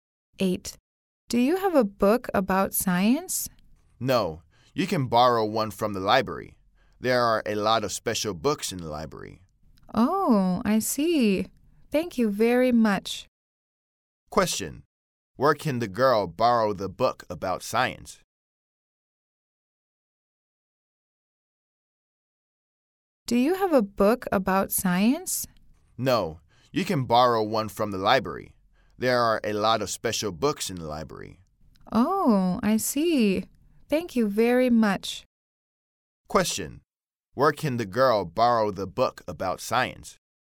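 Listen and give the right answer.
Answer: From the library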